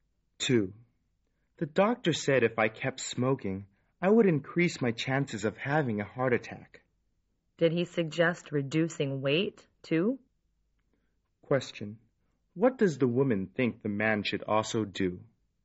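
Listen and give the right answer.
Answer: Reduce his weight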